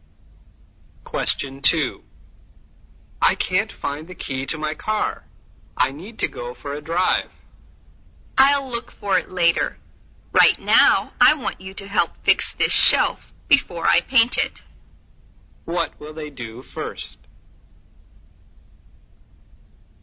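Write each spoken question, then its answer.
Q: What will they do first?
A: Fix the shelf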